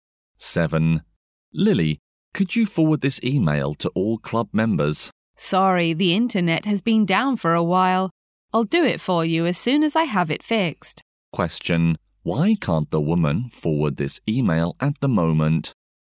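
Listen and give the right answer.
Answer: The internet is down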